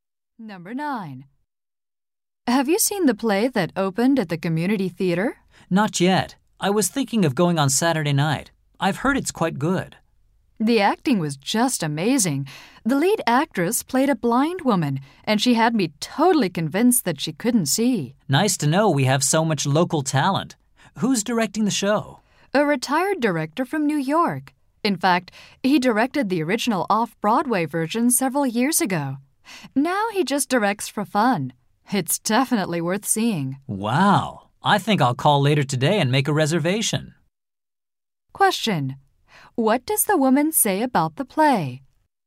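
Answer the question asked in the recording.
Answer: The acting is amazing; it's worth seeing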